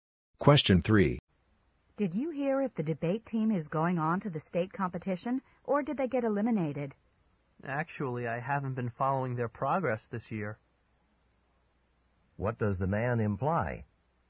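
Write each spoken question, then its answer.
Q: What does the man imply?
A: He doesn't know if the debate team advanced.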